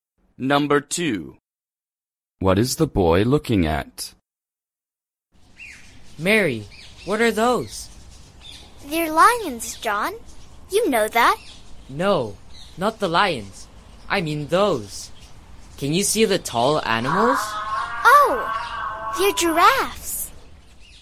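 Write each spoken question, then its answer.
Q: What is the boy looking at?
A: giraffes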